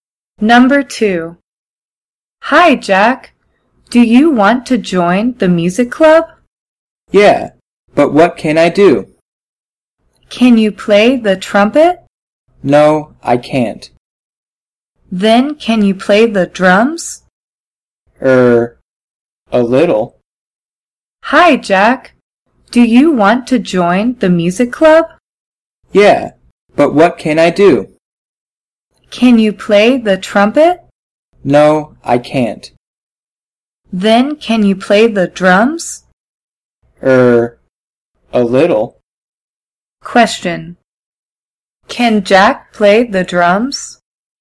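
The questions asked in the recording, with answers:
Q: Can Jack play the drums?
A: Yes, a little.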